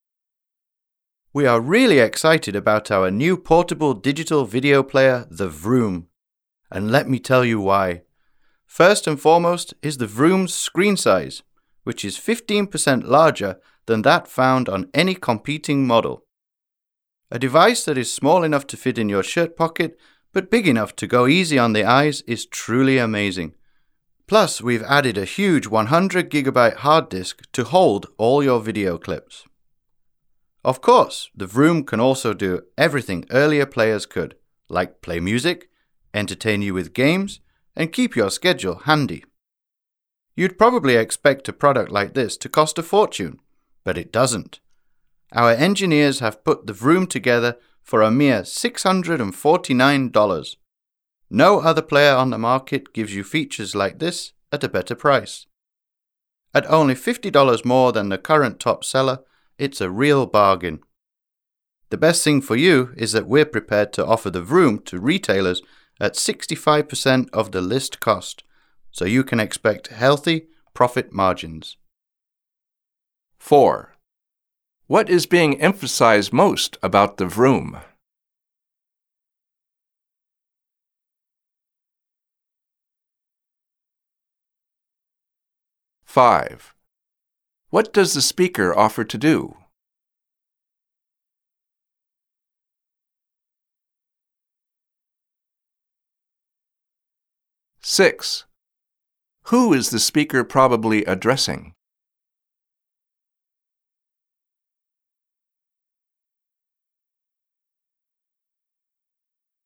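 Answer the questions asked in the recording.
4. Its screen size, 15% larger than any competing model
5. Sell the Vroom to retailers at 65% of the list price
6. Retailers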